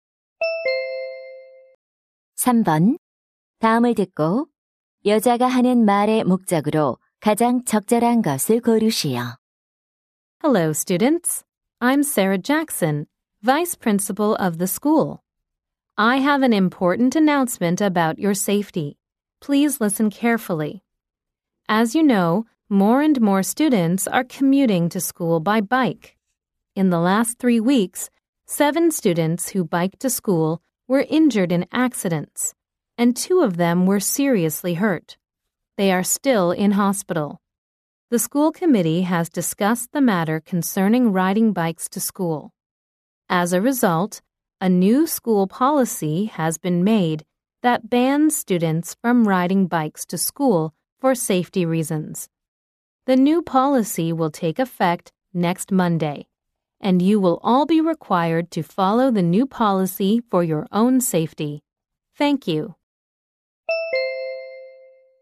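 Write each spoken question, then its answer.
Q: 다음을 듣고 여자가 하는 말의 목적으로 가장 적절한 것을 고르시오.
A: 안전을 위해 자전거 통학을 금지하는 새 학교 방침을 알리려고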